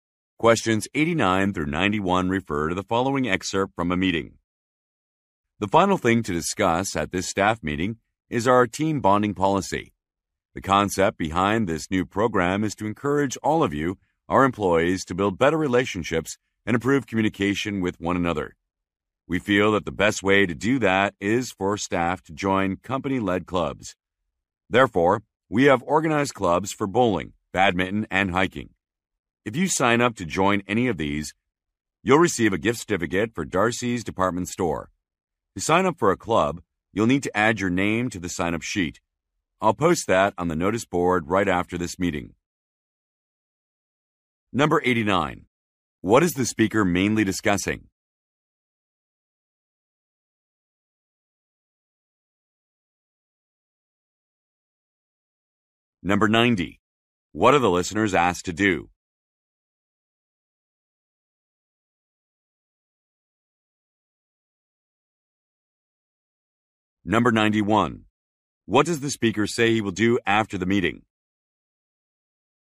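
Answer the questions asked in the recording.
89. A team bonding policy
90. Join company clubs
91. Post a sign-up sheet on the notice board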